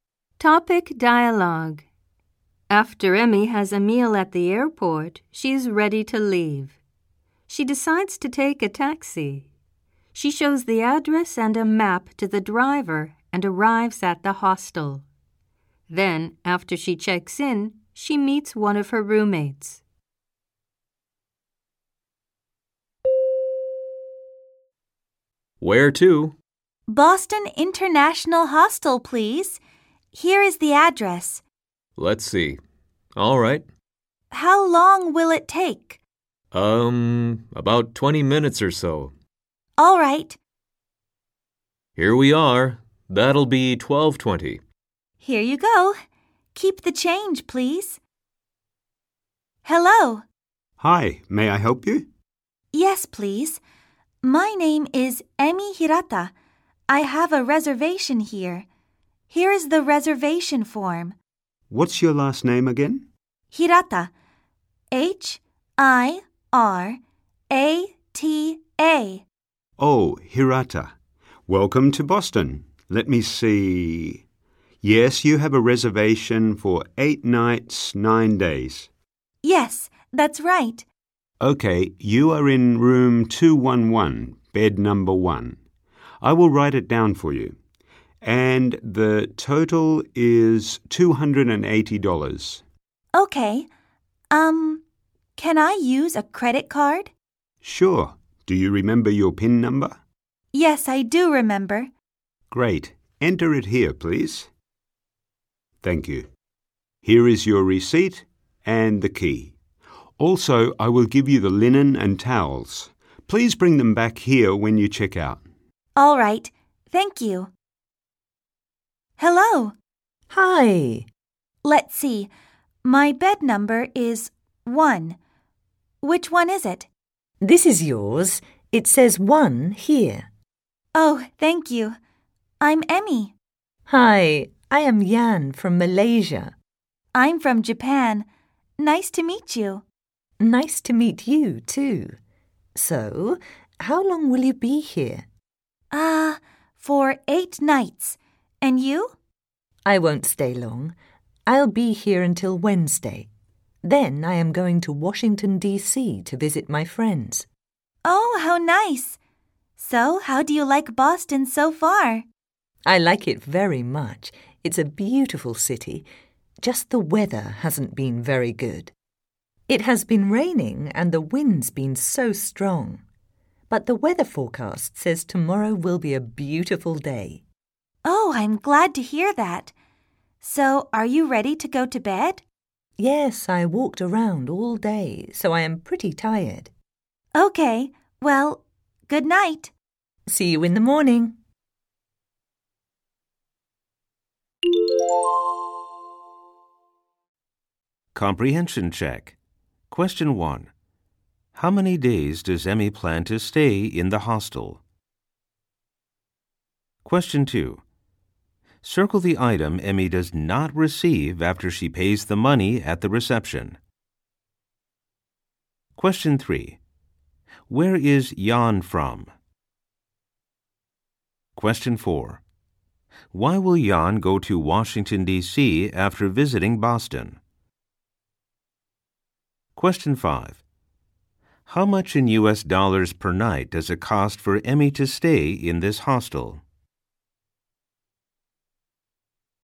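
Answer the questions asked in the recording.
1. 9 days (8 nights)
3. Malaysia
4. To visit her friends
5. $35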